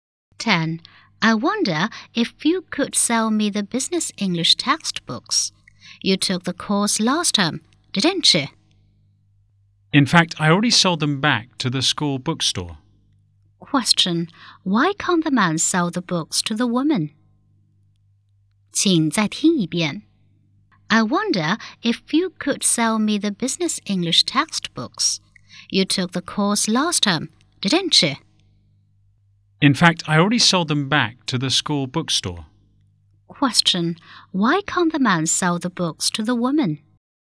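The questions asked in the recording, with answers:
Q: Why can't the man sell the books to the woman?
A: He already sold them back to the school bookstore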